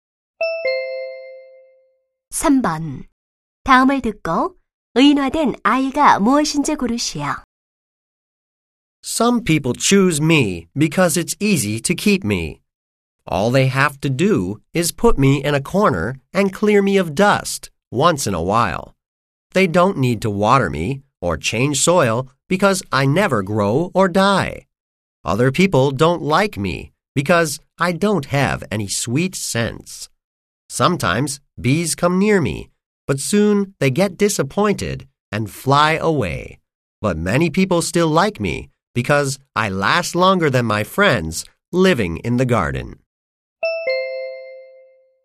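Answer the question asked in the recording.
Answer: 조화(인조 꽃)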